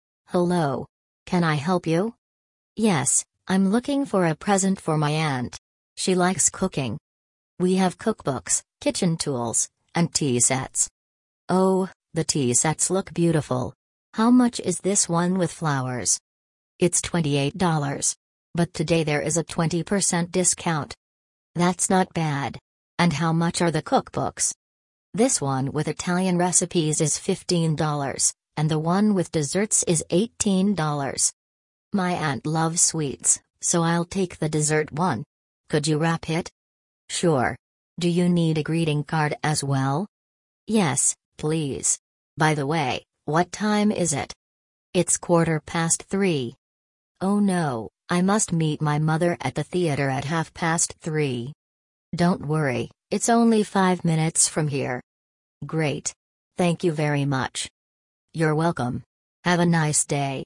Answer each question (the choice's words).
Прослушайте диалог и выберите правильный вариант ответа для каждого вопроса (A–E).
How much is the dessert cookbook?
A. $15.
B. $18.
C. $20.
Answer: $20.

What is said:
– Hello! Can I help you?
– Yes, I'm looking for a present for my aunt. She likes cooking.
– We have cookbooks, kitchen tools, and tea sets.
– Oh, the tea sets look beautiful. How much is this one with flowers?
– It's $28. But today there is a 20% discount.
– That's not bad. And how much are the cookbooks?
– This one with Italian recipes is $15, and the one with desserts is $18.
– My aunt loves sweets, so I'll take the dessert one. Could you wrap it?
– Sure. Do you need a greeting card as well?
– Yes, please. By the way, what time is it?
– It's quarter past three.
– Oh no, I must meet my mother at the theatre at half past three!
– Don't worry, it's only five minutes from here.
– Great. Thank you very much!
– You're welcome. Have a nice day!